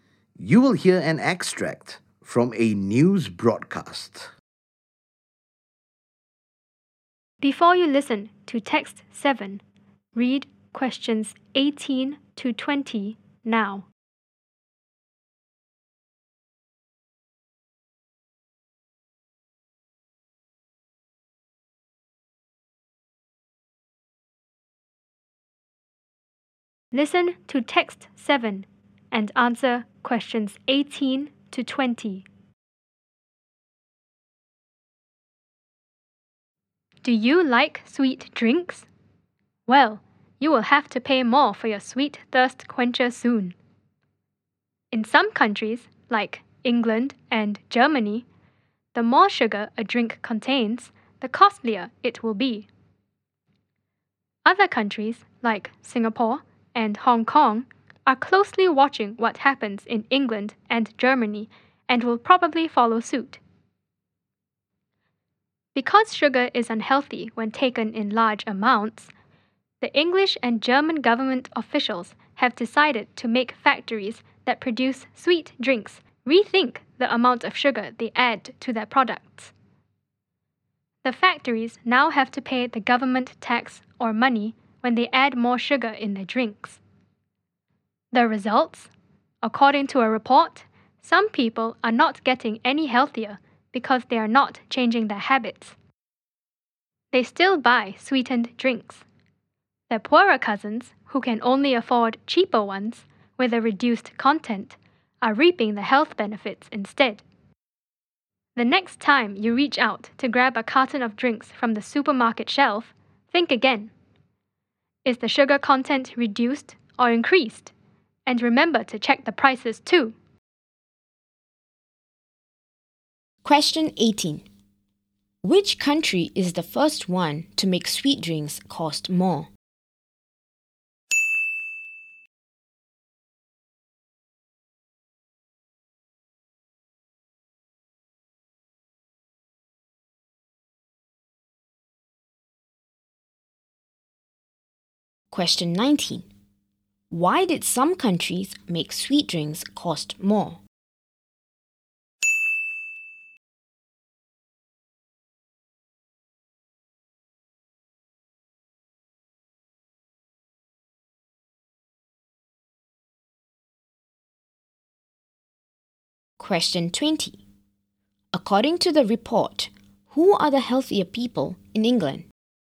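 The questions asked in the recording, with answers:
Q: Why did some countries make sweet drinks cost more?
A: Because sugar is unhealthy when taken in large amounts

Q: According to the report, who are the healthier people in England?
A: Poorer people who can only afford cheaper drinks with less sugar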